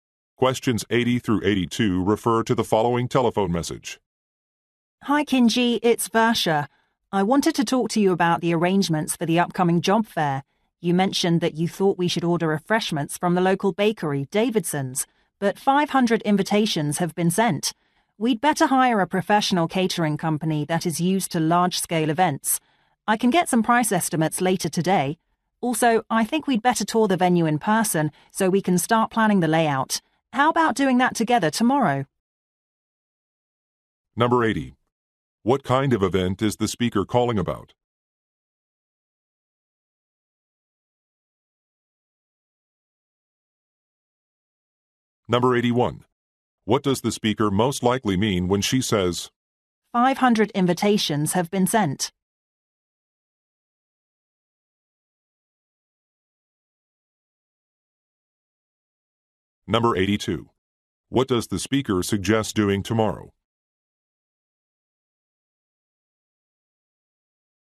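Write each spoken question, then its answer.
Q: What kind of event is the speaker calling about?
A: A job fair

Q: What does the speaker most likely mean when she says, 500 invitations have been sent?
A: The local bakery can't handle such a large event, so a catering company is needed

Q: What does the speaker suggest doing tomorrow?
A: Touring the venue together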